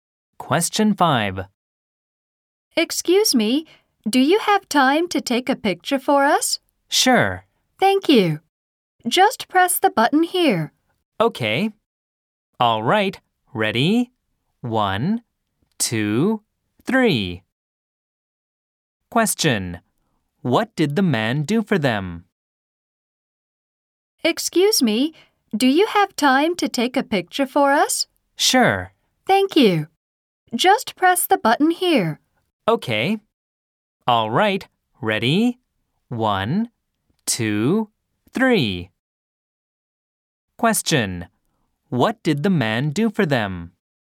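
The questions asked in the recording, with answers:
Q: What did the man do for them?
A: He took a picture for them.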